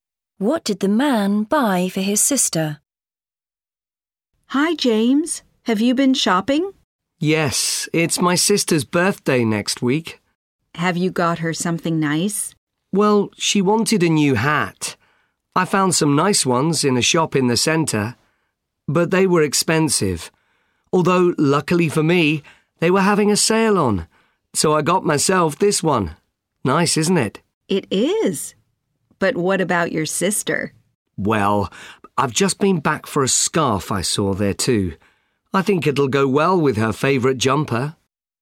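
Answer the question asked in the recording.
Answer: a scarf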